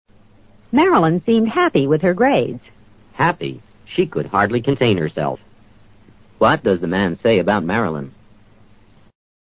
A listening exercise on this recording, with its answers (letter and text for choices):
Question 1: What does the man say about Marilyn?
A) She constructed a proper container.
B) She thought it was hard to do the grading.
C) She pretended she was happy.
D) She was extremely pleased.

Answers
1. D) She was extremely pleased.

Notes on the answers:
此题的关键在contain herself 这个短语。 contain作"抑制""控制"(情感、情绪等)解。 could hardly contain herself是她几乎不能自制。当然是"高兴得不能自制"。D与这个意思是一致的。